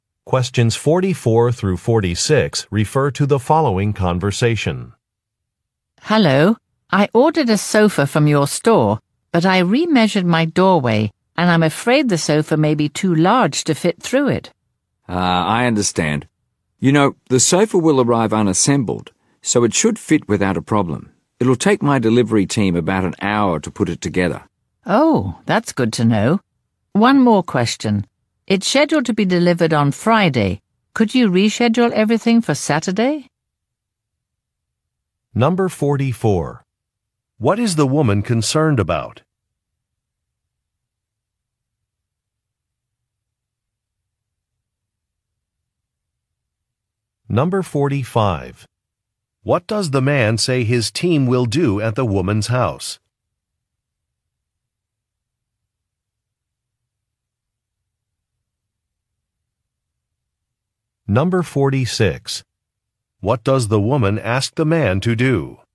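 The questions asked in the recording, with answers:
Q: What is the woman concerned about?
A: The sofa may be too large to fit through her doorway

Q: What does the man say his team will do at the woman's house?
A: Assemble the sofa

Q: What does the woman ask the man to do?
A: Reschedule the delivery for Saturday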